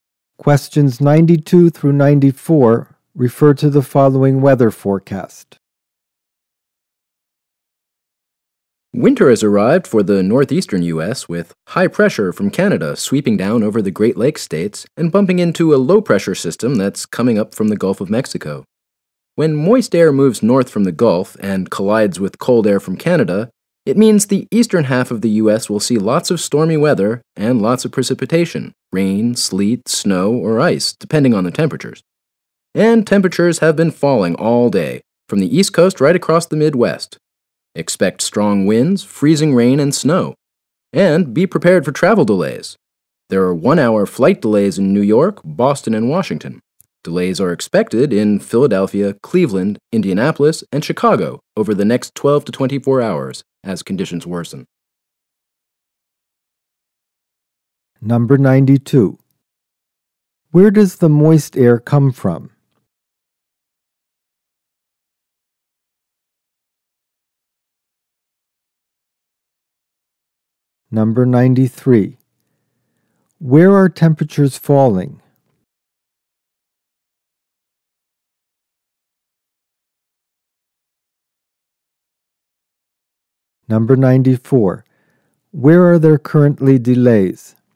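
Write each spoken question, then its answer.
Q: Where does the moist air come from?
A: The Gulf of Mexico

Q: Where are temperatures falling?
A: From the East Coast across the Midwest

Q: Where are there currently delays?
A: New York, Boston, and Washington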